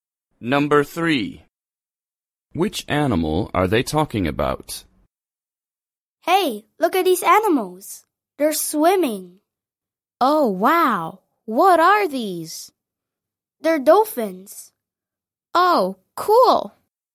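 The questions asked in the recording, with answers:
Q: Which animal are they talking about?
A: dolphins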